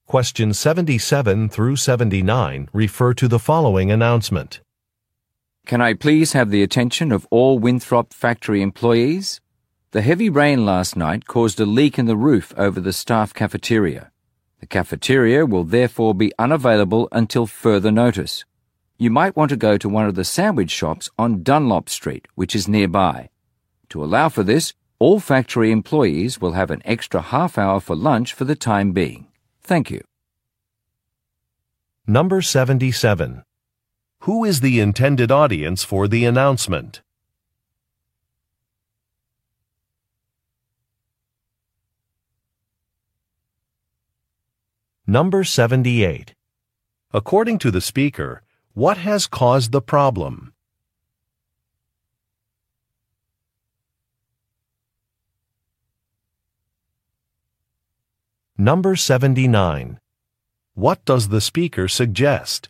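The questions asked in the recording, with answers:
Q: Who is the intended audience for the announcement?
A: Factory employees

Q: According to the speaker, what has caused the problem?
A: Heavy rain causing a roof leak

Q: What does the speaker suggest?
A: Going to a sandwich shop on Dunlop Street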